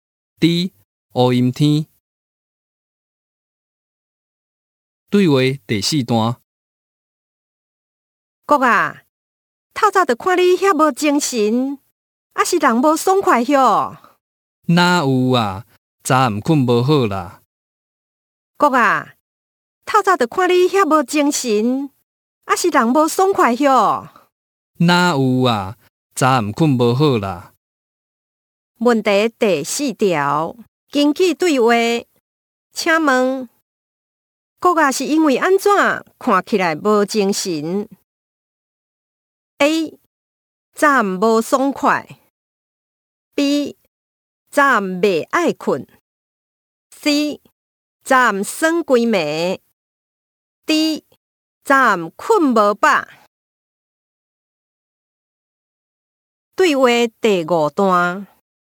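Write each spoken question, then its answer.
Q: 根据对话,请问哥啊是因为安怎看起来无精神?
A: D: 早暗睏无饱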